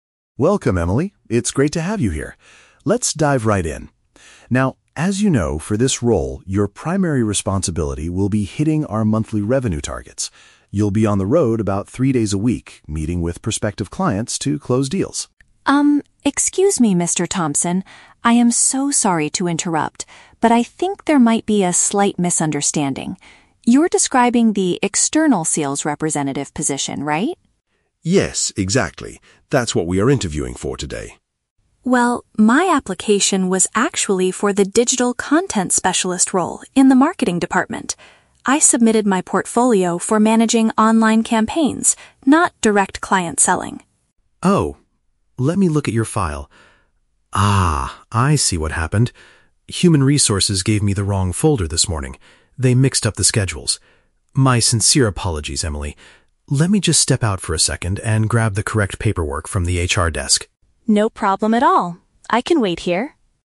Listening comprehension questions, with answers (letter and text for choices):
Listen to a conversation between an interviewer and a job candidate. Choose the correct answer (A, B, or C) for each question.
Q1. What is the main problem in this conversation?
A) The candidate forgot to bring her portfolio.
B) The interviewer is discussing the wrong job.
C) The candidate arrived on the wrong day.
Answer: B) The interviewer is discussing the wrong job.

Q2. What kind of work does the candidate actually want to do?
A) Manage digital campaigns and marketing content.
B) Travel frequently and meet with clients.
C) Organize schedules for the Human Resources department.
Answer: A) Manage digital campaigns and marketing content.

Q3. What is the interviewer going to do next?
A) Call the HR manager on the phone to complain.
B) Leave the room to get the right documents.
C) Ask the candidate to come back for another interview tomorrow.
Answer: B) Leave the room to get the right documents.

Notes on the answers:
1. The candidate points out a misunderstanding, and the interviewer realizes he has the "wrong folder" and is describing the sales role instead of marketing. This means he is discussing a different job.
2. The candidate explicitly states she applied for the "digital content specialist role in the Marketing department" and wants to focus on "managing online campaigns".
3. The interviewer says, "Let me just step out for a second and grab the correct paperwork." "Step out" is paraphrased as "leave the room," and "paperwork" means documents.

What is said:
Interviewer: Welcome, Emily. It's great to have you here. Let's dive right in. Now, as you know, for this role, your primary responsibility will be hitting our monthly revenue targets. You'll be on the road about three days a week, meeting with prospective clients to close deals...
Candidate: Um, excuse me, Mr. Thompson. I am so sorry to interrupt, but I think there might be a slight misunderstanding. You're describing the external sales representative position, right?
Interviewer: Yes, exactly. That's what we are interviewing for today.
Candidate: Well, my application was actually for the digital content specialist role in the Marketing department. I submitted my portfolio for managing online campaigns, not direct client selling.
Interviewer: Oh? Let me look at your file. Ah... I see what happened. Human Resources gave me the wrong folder this morning. They mixed up the schedules. My sincere apologies, Emily. Let me just step out for a second and grab the correct paperwork from the HR desk.